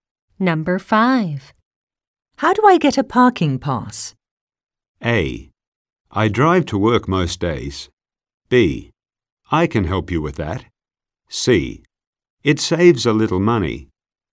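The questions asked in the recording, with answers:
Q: How do I get a parking pass?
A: B: I can help you with that.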